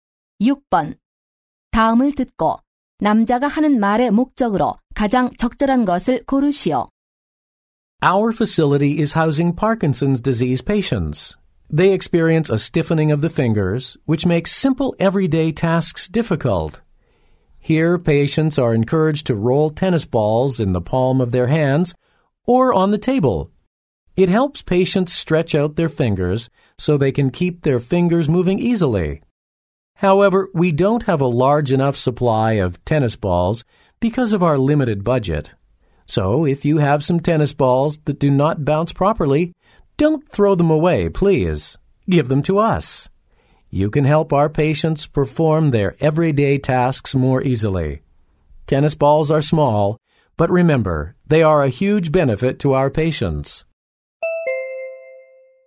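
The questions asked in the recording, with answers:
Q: 다음을 듣고 남자가 하는 말의 목적으로 가장 적절한 것을 고르시오.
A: 안 쓰는 테니스공 기증 요청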